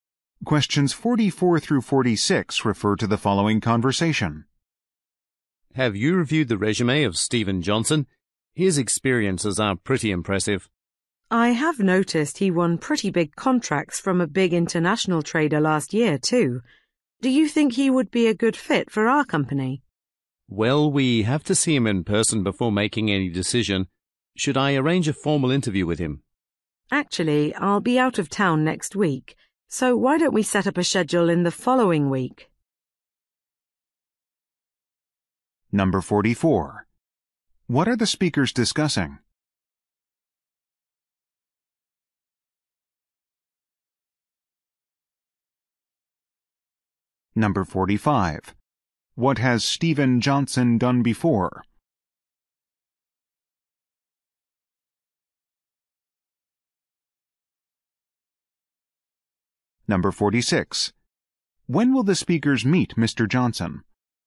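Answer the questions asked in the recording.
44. A job candidate's resume
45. Won big contracts from an international trader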